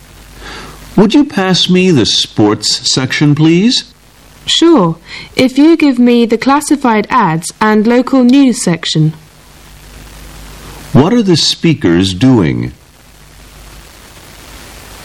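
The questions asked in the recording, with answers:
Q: What are the speakers doing?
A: Reading a newspaper.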